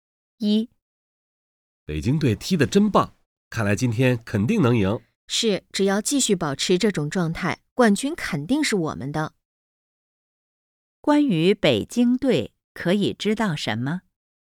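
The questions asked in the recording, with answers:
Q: 关于北京队可以知道什么?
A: 北京队踢得很好,很可能赢/得冠军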